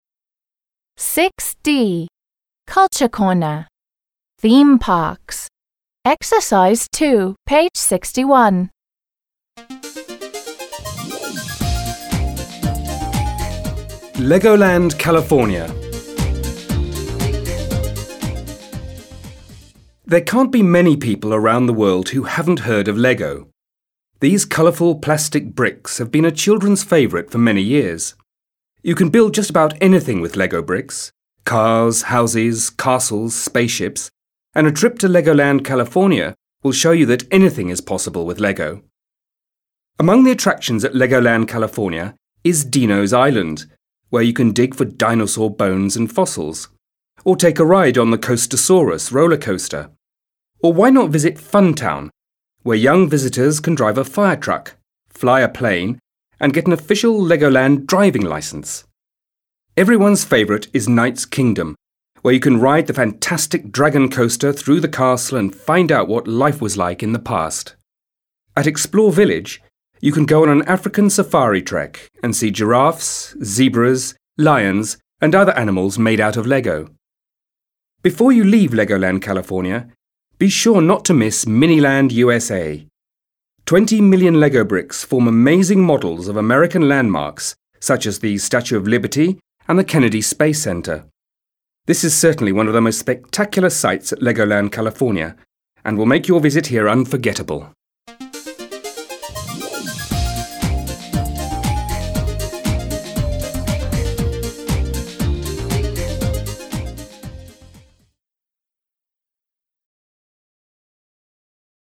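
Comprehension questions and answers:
2. Which of the following can you do there? Listen, read and check.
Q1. dig for dinosaur bones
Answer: yes

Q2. ride a camel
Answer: no

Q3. swim in a pool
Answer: no

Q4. go on a safari trek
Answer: yes

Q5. take a ride on a roller coaster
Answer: yes

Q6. drive a fire truck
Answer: yes

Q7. eat toffee apples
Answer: no

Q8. see American landmarks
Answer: yes

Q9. fly a plane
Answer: yes

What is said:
Legoland California
There can't be many people around the world who haven't heard of LEGO. These colourful plastic bricks have been a children's favourite for many years. You can build just about anything with LEGO bricks − cars, houses, castles, spaceships − and a trip to Legoland California will show you that anything is possible with LEGO.
Among the attractions at Legoland California is Dino's Island, where you can dig for dinosaur bones
and fossils, or take a ride on the Coastersaurus roller coaster. 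Or why not visit Fun Town, where young visitors can drive a fire truck, fly a plane and get an official Legoland driving licence! Everyone's favourite is Knights' Kingdom, where you can ride the fantastic Dragon Coaster through the castle and find out what life was like in the past. At Explore Village, you can go on an African safari trek and see giraffes, zebras, lions and other animals made out of LEGO.
Before you leave Legoland California, be sure not to miss Miniland USA. Twenty million LEGO bricks form amazing models of American landmarks such as the Statue of Liberty and the Kennedy Space Center. This is certainly one of the most spectacular sights at Legoland California and will make your visit here unforgettable.

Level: 7 класс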